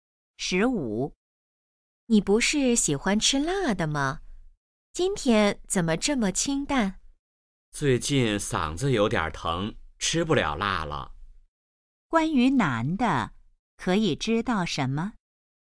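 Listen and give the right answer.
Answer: 最近嗓子疼,吃不了辣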